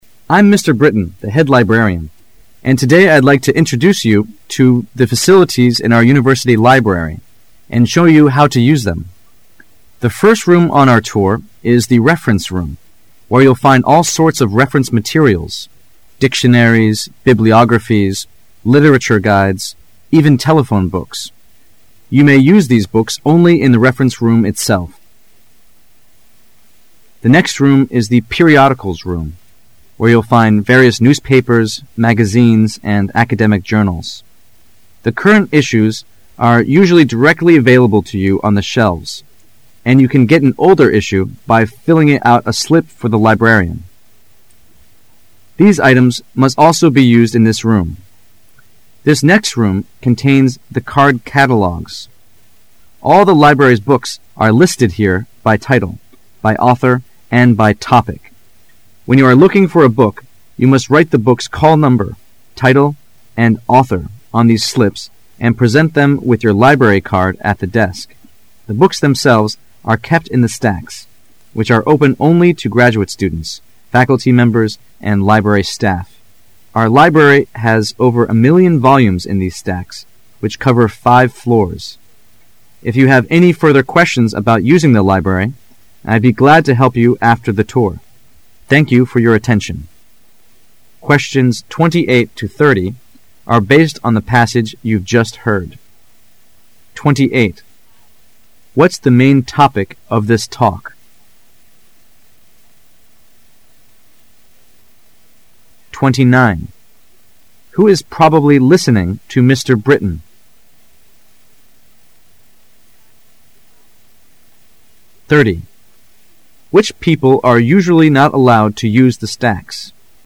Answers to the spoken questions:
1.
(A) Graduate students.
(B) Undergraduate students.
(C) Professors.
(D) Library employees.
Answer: (B) Undergraduate students.
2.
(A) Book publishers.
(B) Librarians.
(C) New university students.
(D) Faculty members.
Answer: (C) New university students.

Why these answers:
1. Which people are usually not allowed to use the stacks? [试题分析]本题考查对文中的细节的把握。 [详细解答]文章中已说明The books themselves are kept in the stacks.which are open only t0 graduate students,faculty members and library staff."可知应选B。

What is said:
Britain, the head librarian, and today I'd like to introduce you to the facilities in our university library and show you how to use them. The first room on our tour is the reference room, where you'll find all sorts of reference materials: dictionaries, bibliographies, literature guides, even telephone books. You may use these books only in the reference room itself. The next room is the periodicals room, where you'll find various newspapers, magazines and academic journals. The current issues are usually directly available to you on the shelves. And you can get an older issue by filling out a slip for the librarian. These items must also be used in this room. This next room contains the card catalogs. All the library's books are listed here by title, by author and by topic. When you are looking for a book you must write the book's call number, title and author on these slips and present them with your library card at the desk. The books themselves are kept in the stacks, which are open only to graduate students, faculty members and library staff. Our library has over a million volumes in these stacks which cover five floors. If you have any further questions about using the library, I'd be glad to help you after the tour. Thank you for your attention. What is the main topic of this talk?